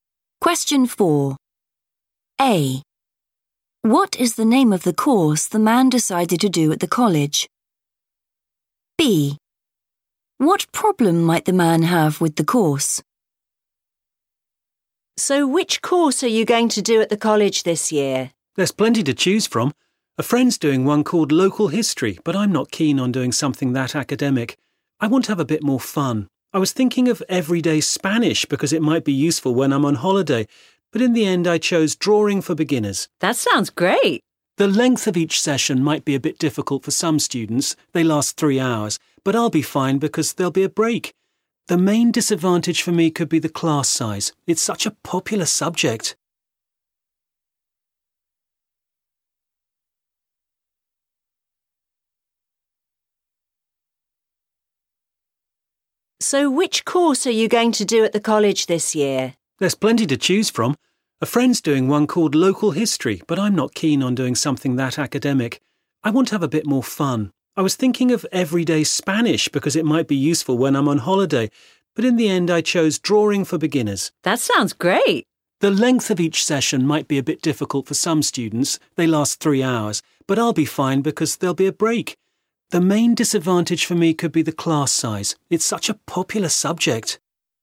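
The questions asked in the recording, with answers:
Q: What is the name of the course the man decided to do at the college?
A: Drawing for Beginners

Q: What problem might the man have with the course?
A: the class size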